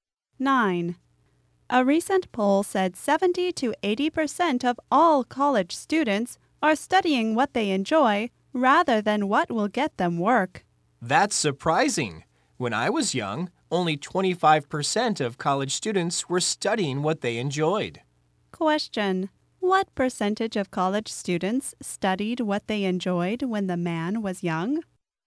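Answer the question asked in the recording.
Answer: 25%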